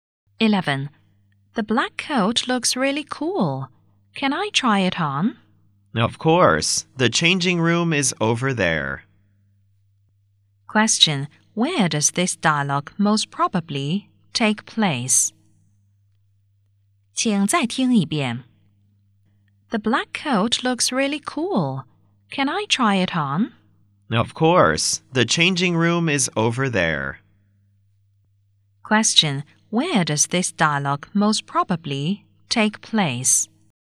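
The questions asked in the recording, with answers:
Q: Where does this dialogue most probably take place?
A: In a clothes shop.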